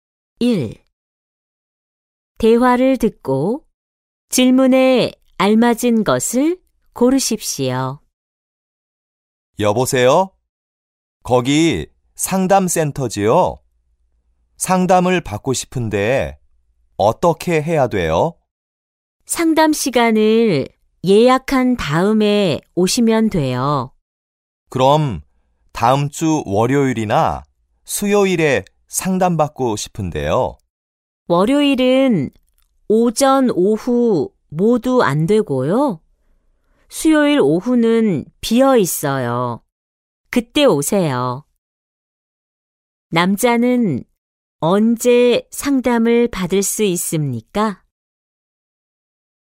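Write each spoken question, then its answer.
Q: 남자는 언제 상담을 받을 수 있습니까?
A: 다음 주 수요일 오후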